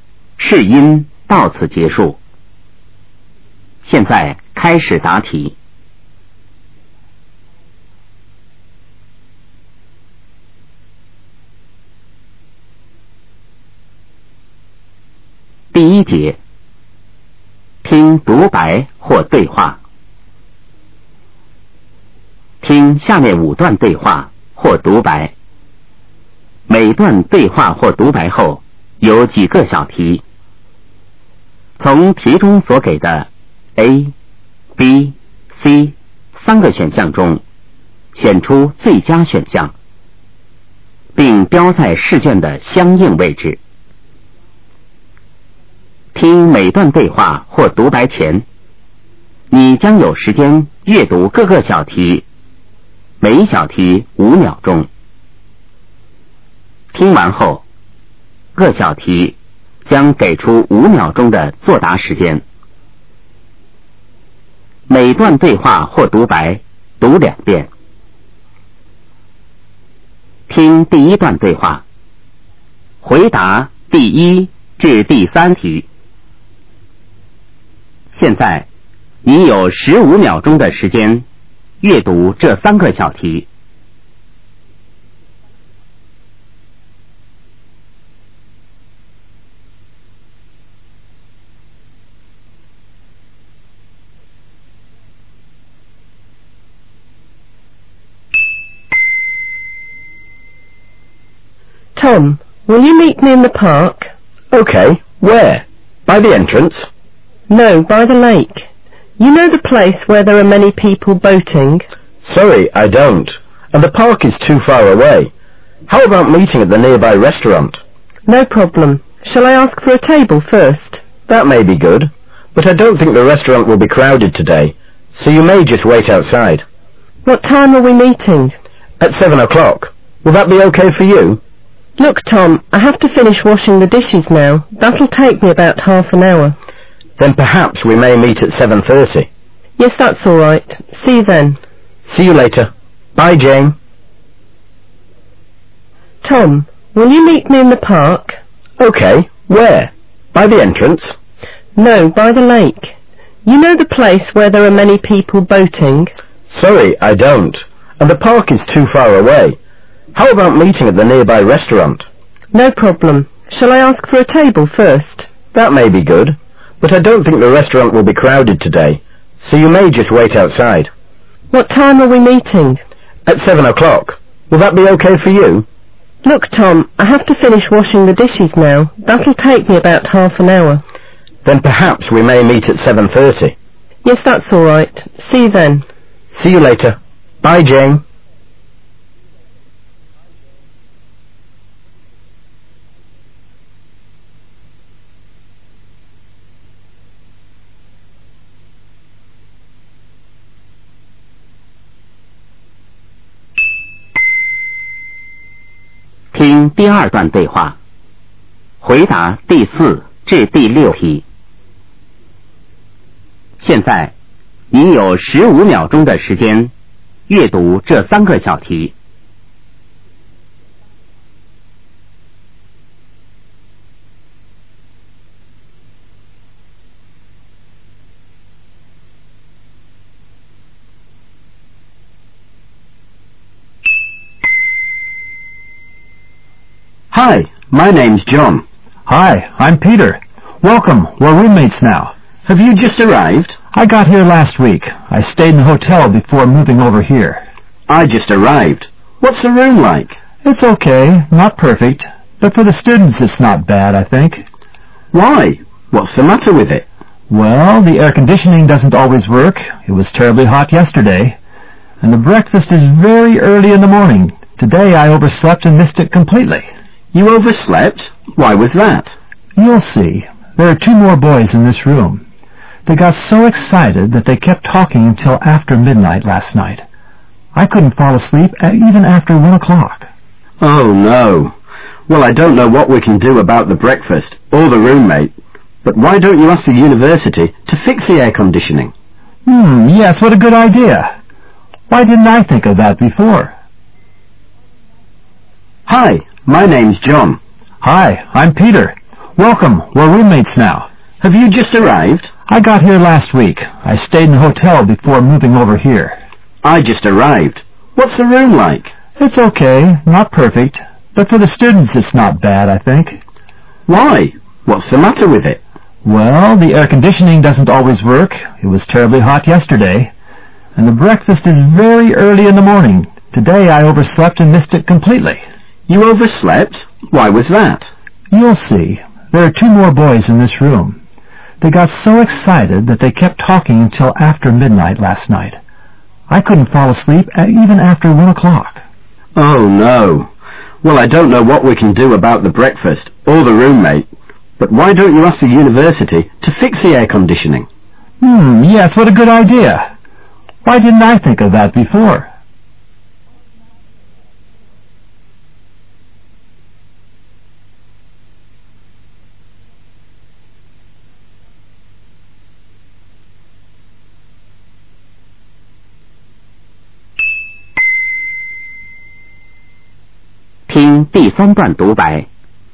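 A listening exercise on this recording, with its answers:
听下面5段对话或独白。每段对话或独白后有几个小题,从题中所给的A、B、C三个选项中选出最佳选项,并标在试卷的相应位置,听每段对话或独白前,你将有时间阅读各个小题,每小题5秒钟;听完后,各小题将给出5秒钟的作答时间。每段对话或独白读两遍。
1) Where does Jane ask Tom to meet her at first?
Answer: In the park, by the lake

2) When and where do they agree to meet finally?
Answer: At 7:30, outside the nearby restaurant

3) What does Jane have to do before going out to meet Tom?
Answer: Finish washing the dishes

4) According to Peter, what is the problem with the building?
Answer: The air-conditioning stops working sometimes.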